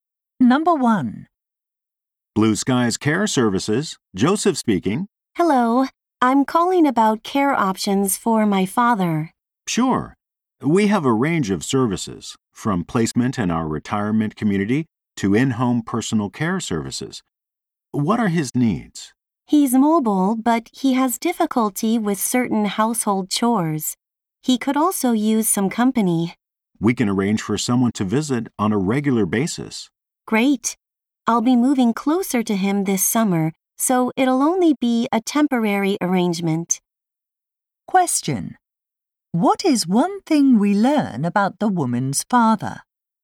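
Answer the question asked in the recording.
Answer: He needs some help with household chores, and company, for a short time only.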